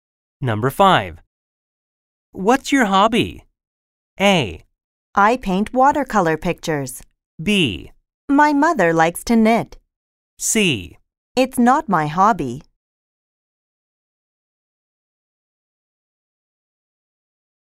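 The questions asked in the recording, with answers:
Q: What's your hobby?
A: A: I paint watercolor pictures.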